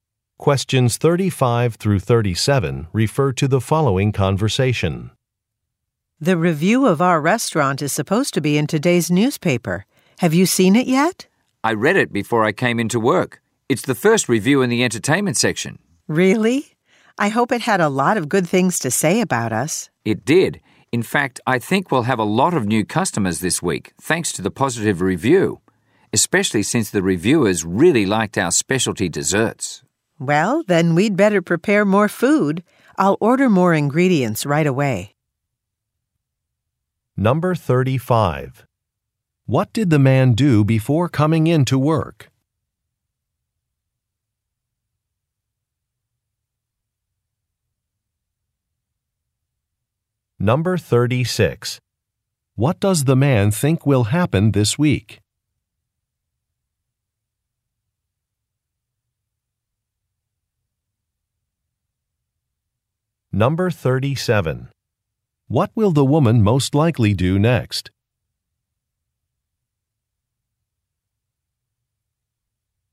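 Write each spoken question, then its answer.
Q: What did the man do before coming in to work?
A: He read the restaurant review in the newspaper.

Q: What does the man think will happen this week?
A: The restaurant will get many new customers.

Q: What will the woman most likely do next?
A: Order more ingredients.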